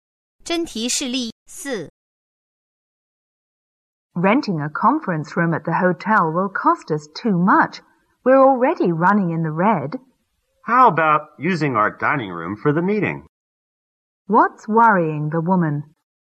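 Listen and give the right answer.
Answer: The cost; they are already losing money.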